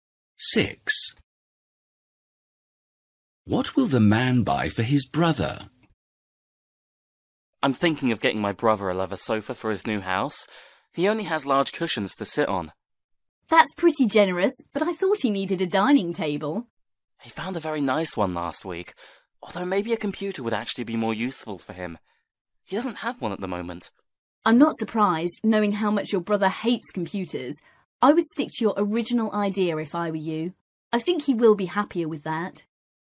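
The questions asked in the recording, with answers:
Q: What will the man buy for his brother?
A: A leather sofa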